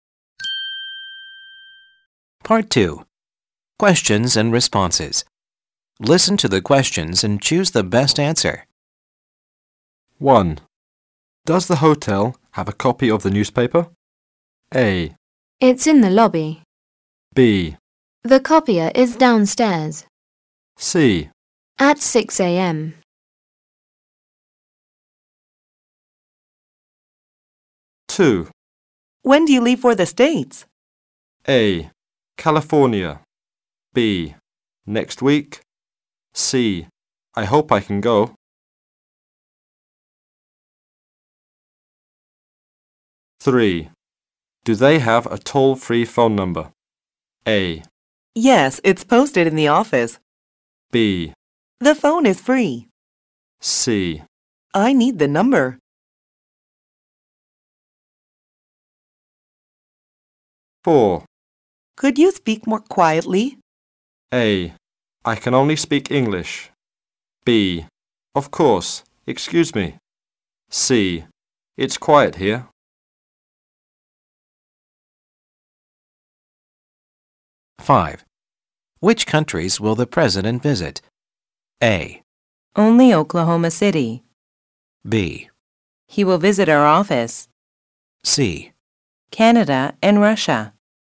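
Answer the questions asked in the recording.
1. A: It's in the lobby.
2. B: Next week.
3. A: Yes, it's posted in the office.
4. B: Of course, excuse me.
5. C: Canada and Russia.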